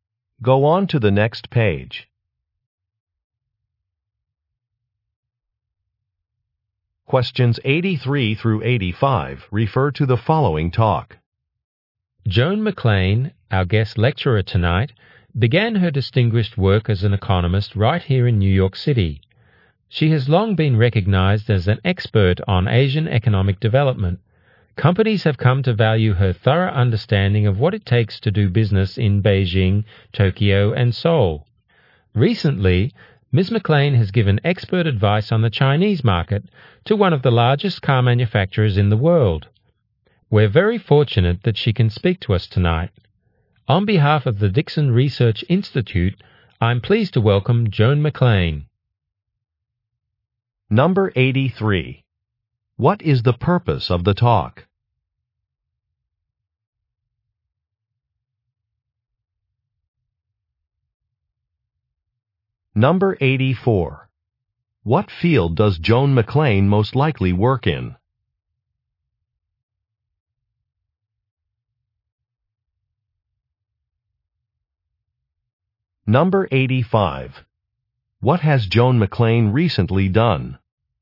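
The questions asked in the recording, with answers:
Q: What is the purpose of the talk?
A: To introduce a guest speaker

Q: What field does Joan McLean most likely work in?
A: Economics

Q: What has Joan McLean recently done?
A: Advised a large car manufacturer on the Chinese market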